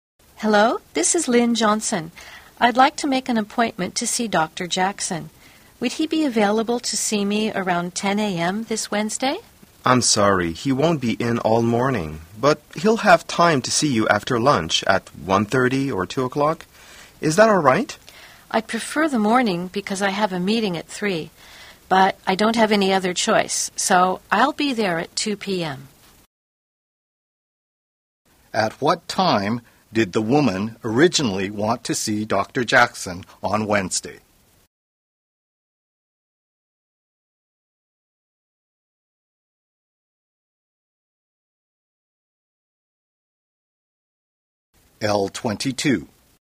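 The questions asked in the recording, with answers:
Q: At what time did the woman originally want to see Dr. Jackson on Wednesday?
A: Around 10 a.m.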